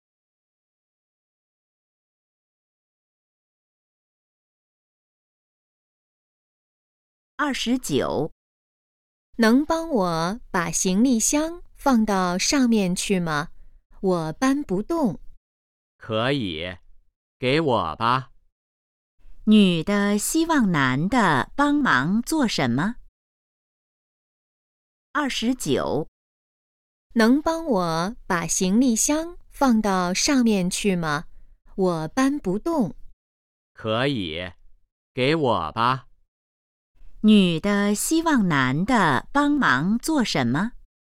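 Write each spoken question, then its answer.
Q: 女的希望男的帮忙做什么?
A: 把行李箱放到上面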